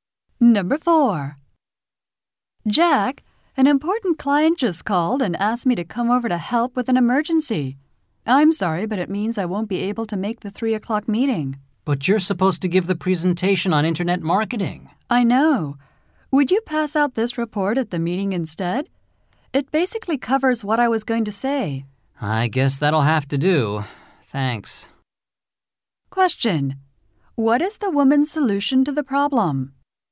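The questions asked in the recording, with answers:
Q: What is the woman's solution to the problem?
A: Jack will hand out her report at the meeting in place of her presentation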